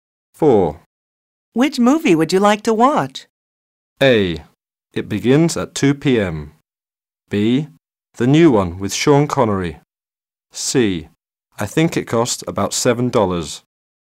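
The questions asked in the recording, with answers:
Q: Which movie would you like to watch?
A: B: The new one with Sean Connery.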